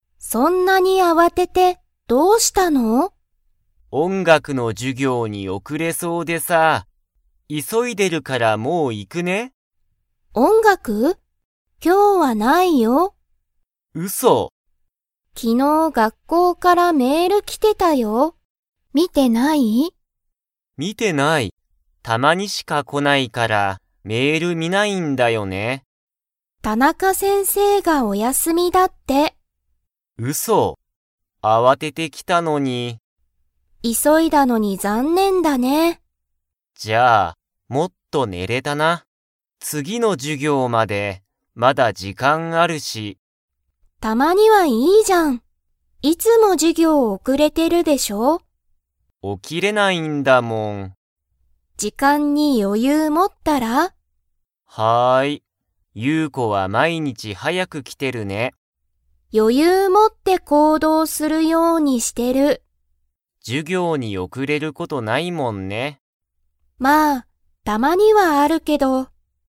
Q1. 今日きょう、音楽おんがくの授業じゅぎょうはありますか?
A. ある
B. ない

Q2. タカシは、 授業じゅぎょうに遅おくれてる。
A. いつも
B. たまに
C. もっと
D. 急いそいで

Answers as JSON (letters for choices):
{"1": "B", "2": "A"}

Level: Level 4